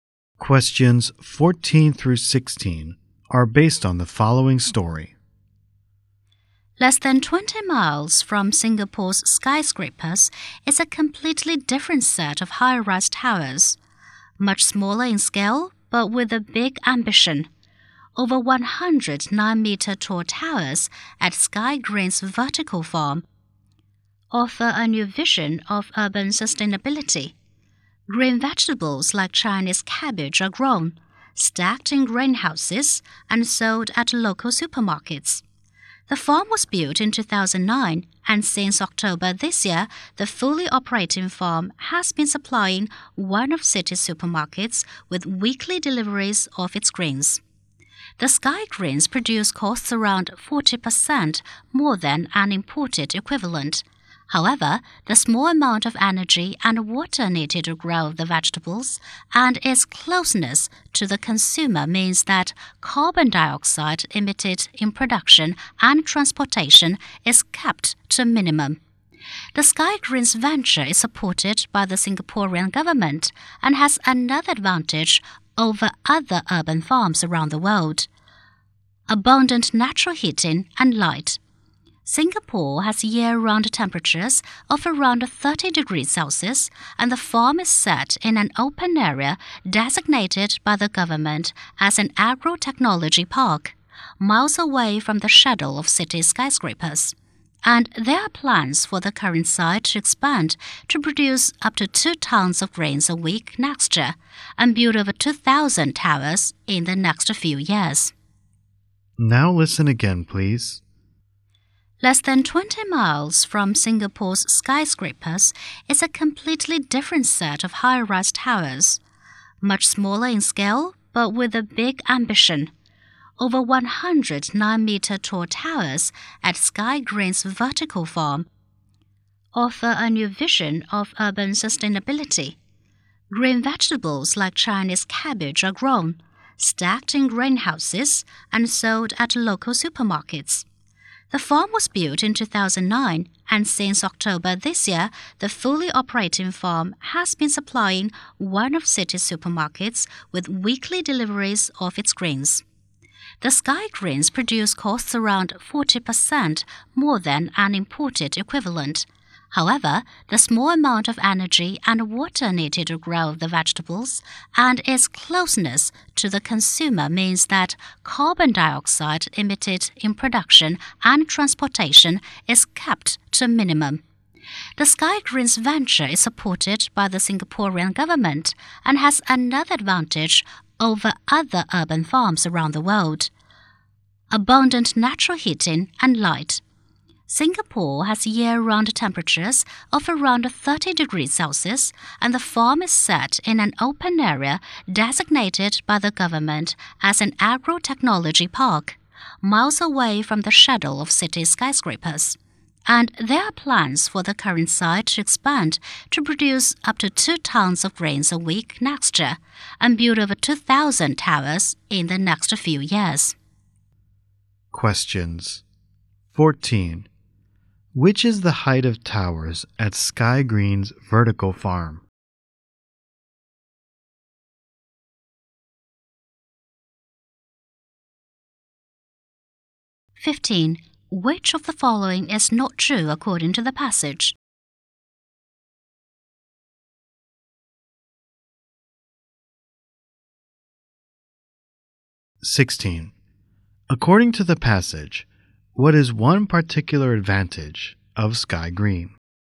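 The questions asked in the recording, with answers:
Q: According to the passage, what is one particular advantage of Sky Green?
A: Abundant natural heating and light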